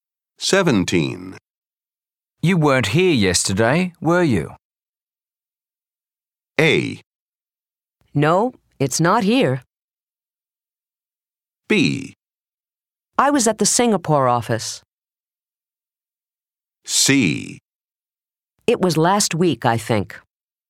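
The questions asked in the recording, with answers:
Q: You weren't here yesterday, were you?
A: B: I was at the Singapore office.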